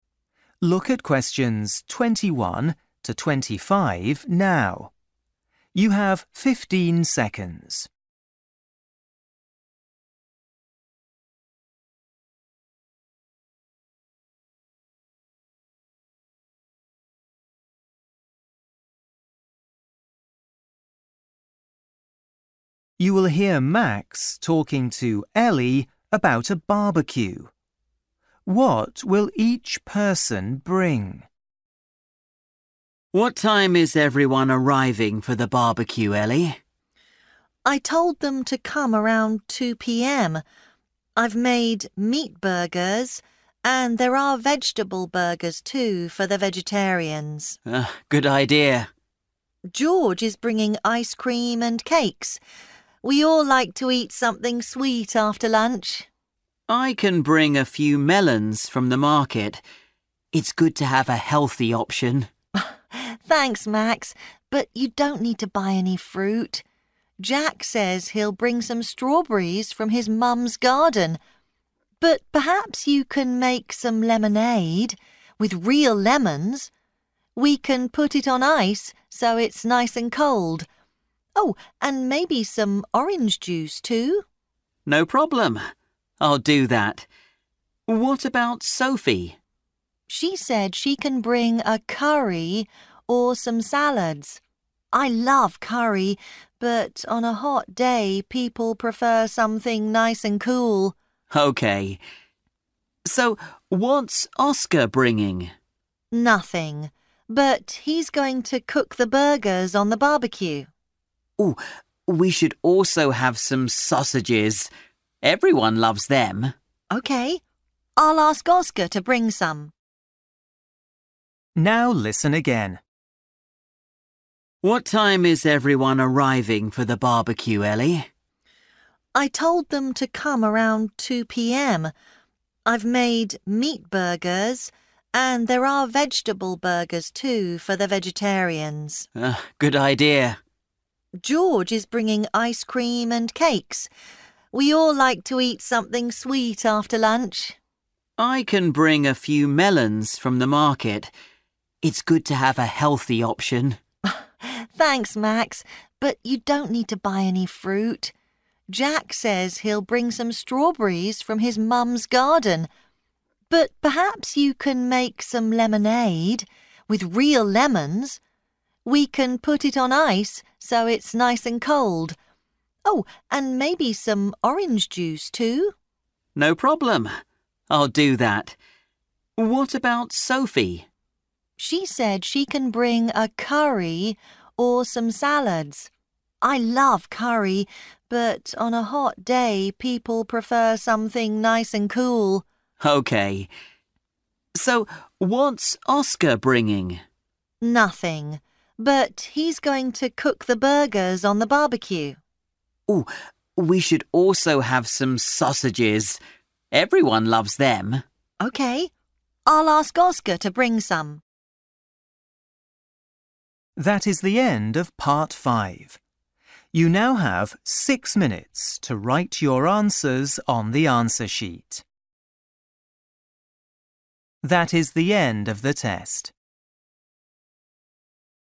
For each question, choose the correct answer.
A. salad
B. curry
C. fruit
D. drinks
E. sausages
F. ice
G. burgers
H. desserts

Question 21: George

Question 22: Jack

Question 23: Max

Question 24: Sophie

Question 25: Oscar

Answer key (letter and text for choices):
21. H. desserts
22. C. fruit
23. D. drinks
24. A. salad
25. E. sausages

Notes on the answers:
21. George is bringing ice cream and cakes. We all like to eat something sweet after lunch.

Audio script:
Max: What time is everyone arriving for the barbecue, Ellie?
Ellie: I told them to come around 2 p.m. I've made meat burgers, and there are vegetable burgers, too, for the vegetarians.
Max: Good idea.
Ellie: George is bringing ice cream and cakes. We all like to eat something sweet after lunch.
Max: I can bring a few melons from the market. It's good to have a healthy option.
Ellie: Thanks, Max, but you don't need to buy any fruit. Jack says he'll bring some strawberries from his mum's garden. But perhaps you can make some lemonade – with real lemons. We can put it on ice so it's nice and cold. Oh, and maybe some orange juice, too?
Max: No problem! I'll do that. What about Sophie?
Ellie: She said she can bring a curry or some salads. I love curry, but on a hot day people prefer something nice and cool!
Max: OK, so what's Oscar bringing?
Ellie: Nothing, but he's going to cook the burgers on the barbecue.
Max: We should also have some sausages. Everyone loves them.
Ellie: OK. I'll ask Oscar to bring some.
Now listen again.

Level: KET (A2)